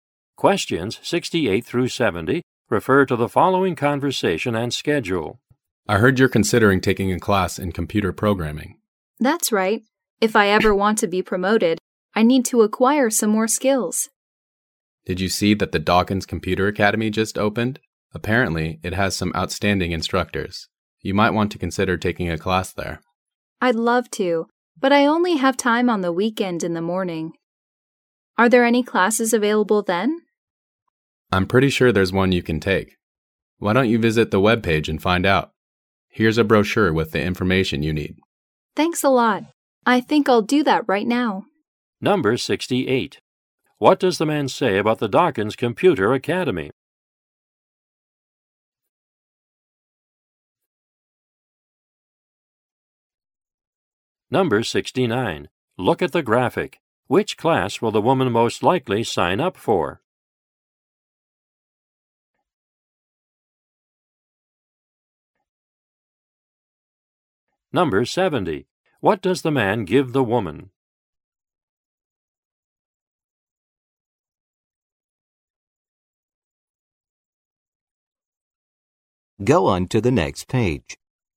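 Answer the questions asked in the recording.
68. It has outstanding instructors
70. A brochure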